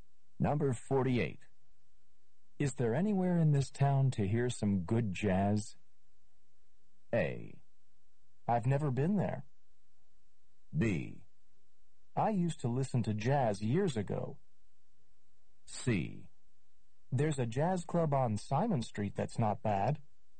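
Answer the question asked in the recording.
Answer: C: There's a jazz club on Simon Street that's not bad.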